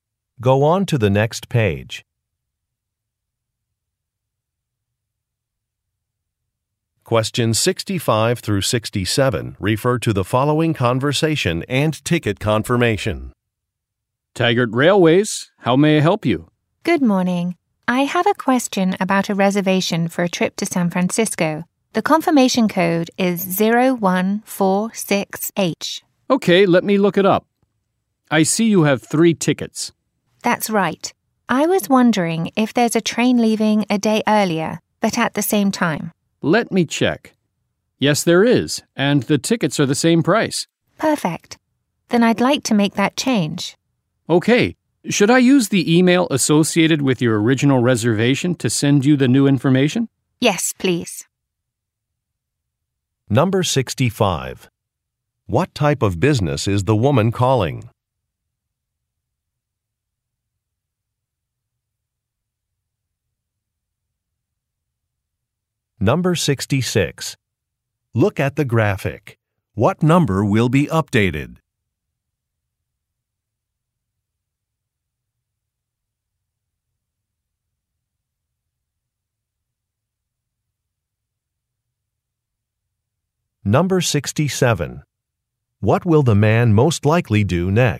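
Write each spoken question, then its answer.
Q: What type of business is the woman calling?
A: A railway company

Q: What will the man most likely do next?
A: Email her the new ticket information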